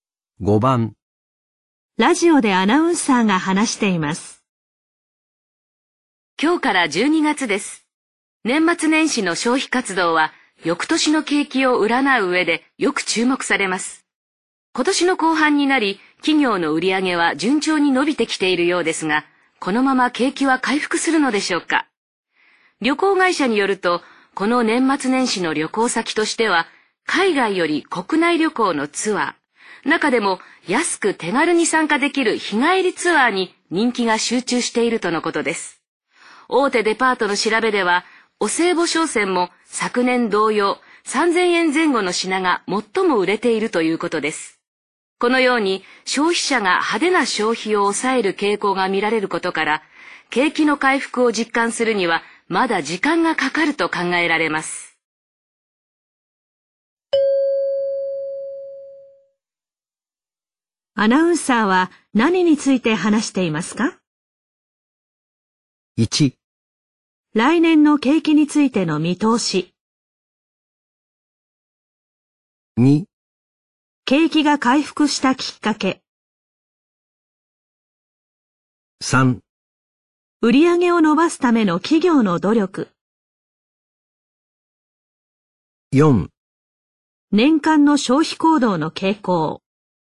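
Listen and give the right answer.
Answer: 1: 来年の景気についての見通し。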